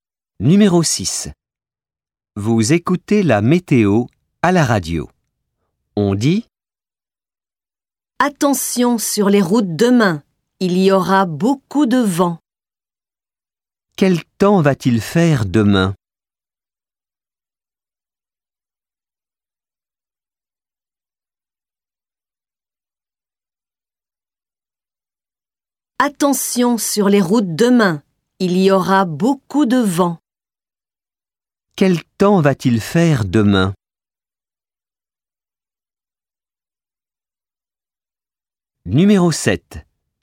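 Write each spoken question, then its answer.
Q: Quel temps va-t-il faire demain?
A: Il y aura beaucoup de vent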